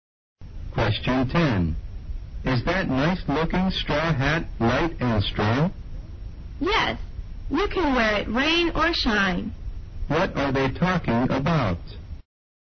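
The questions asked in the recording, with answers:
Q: What are they talking about?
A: A straw hat.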